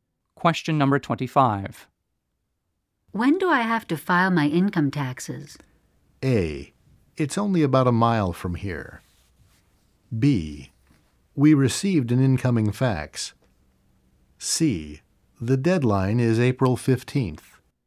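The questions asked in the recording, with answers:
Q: When do I have to file my income taxes?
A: C: The deadline is April 15th.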